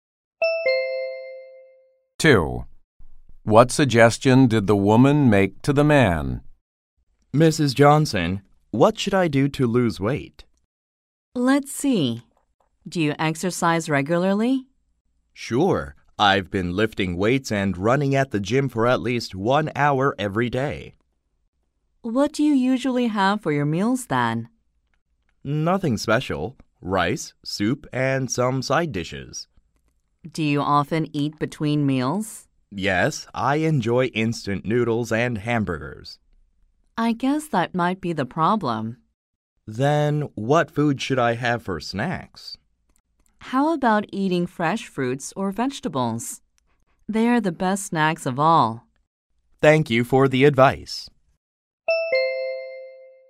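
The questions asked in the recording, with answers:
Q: What suggestion did the woman make to the man?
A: Eat fresh fruits or vegetables as snacks instead of instant noodles and hamburgers.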